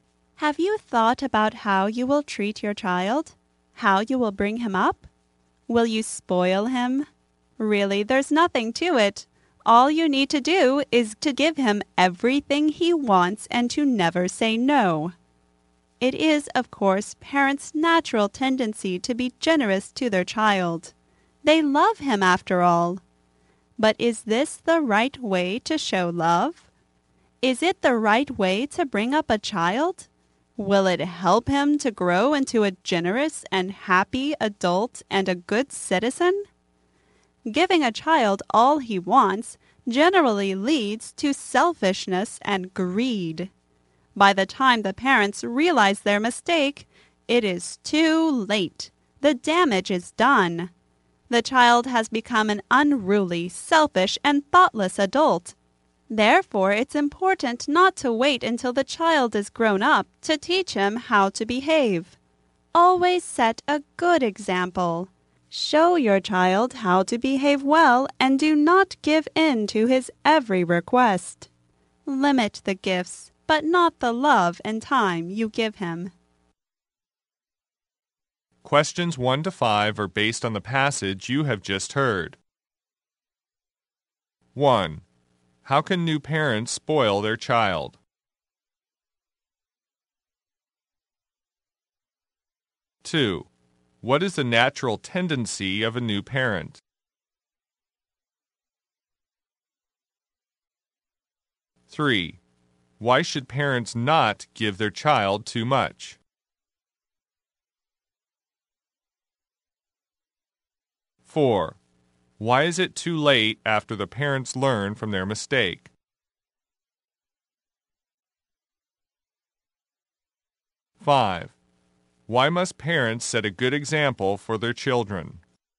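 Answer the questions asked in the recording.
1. Give him everything he wants and never say no
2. To be generous to their child
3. It leads to selfishness and greed
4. The damage is done; the child is already a selfish adult
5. To show the child how to behave well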